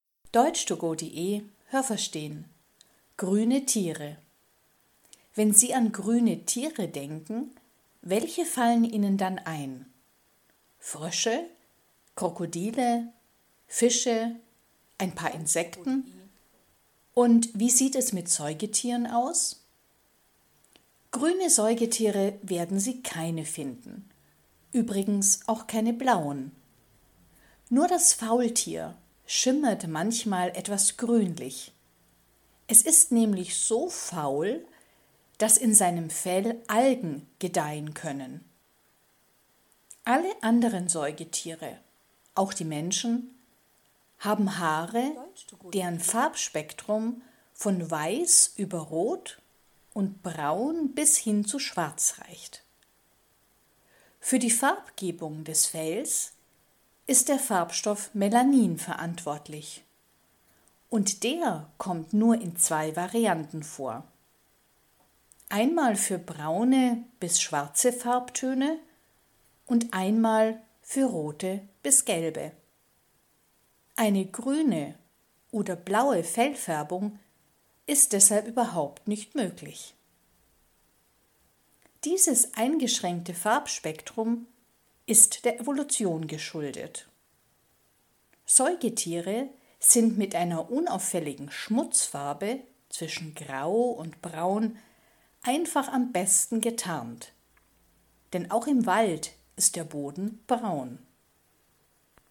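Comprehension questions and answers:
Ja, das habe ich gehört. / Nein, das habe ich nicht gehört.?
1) Es gibt keine grünen Säugetiere, aber ein paar blaue.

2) Das Faultier ist das einzige Säugetier, das früher ein ganz grünes Fell hatte.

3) Das Farbspektrum der menschlichen Haare ist größer als das Farbspektrum bei Säugetieren.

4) Das Melanin ist ein Farbstoff, der entweder braune bis schwarze oder rote bis gelbe Farbtöne bildet,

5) Mit den Farben Grau und Braun sind Säugetiere auch im Wald am besten getarnt.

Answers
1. Nein, das habe ich nicht gehört.
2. Nein, das habe ich nicht gehört.
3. Nein, das habe ich nicht gehört.
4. Ja, das habe ich gehört.
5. Ja, das habe ich gehört.

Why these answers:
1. Es gibt weder grüne noch blaue Säugetiere.
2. Das Fell schimmert manchmal nur leicht grün, weil darin Algen wachsen.
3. Das Farbspektrum ist bei Menschen und Säugetieren gleich.

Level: B1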